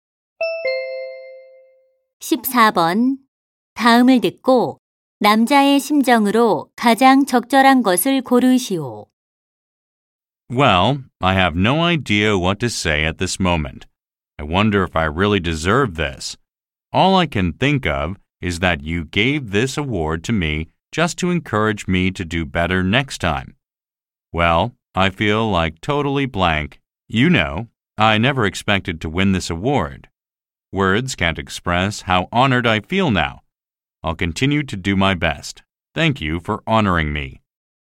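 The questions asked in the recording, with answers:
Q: 다음을 듣고 남자의 심정으로 가장 적절한 것을 고르시오.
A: 영광스럽고 감격스러움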